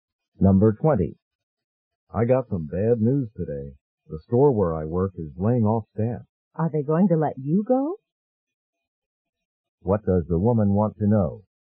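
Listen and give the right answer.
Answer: Whether the man will lose his job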